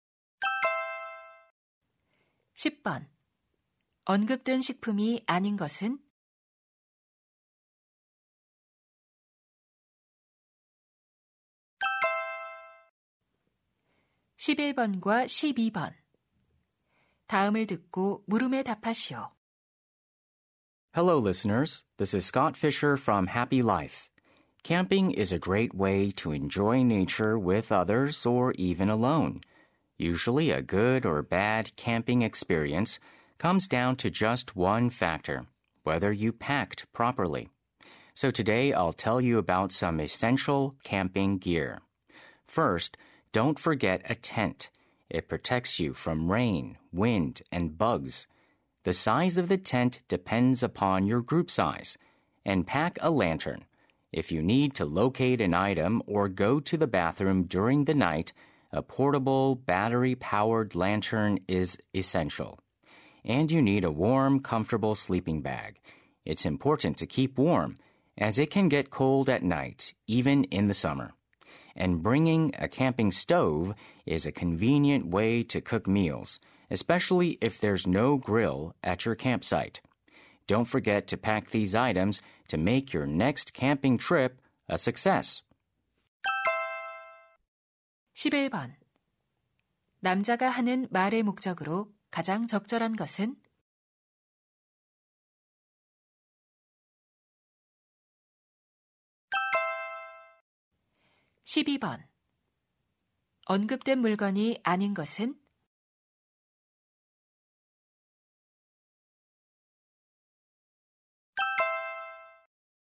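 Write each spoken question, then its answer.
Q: 남자가 하는 말의 목적으로 가장 적절한 것은?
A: 필수 캠핑 장비를 소개하려고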